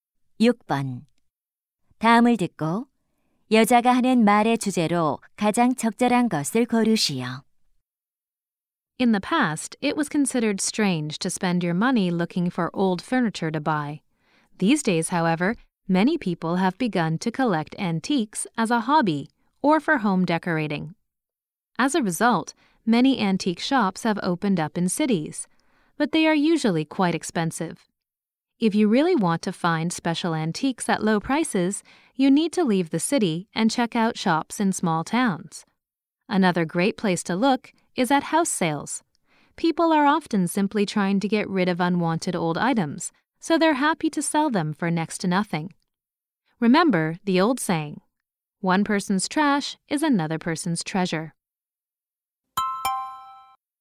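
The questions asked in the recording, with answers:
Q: 다음을 듣고 여자가 하는 말의 주제로 가장 적절한 것을 고르시오.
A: 골동품을 싸게 구하는 방법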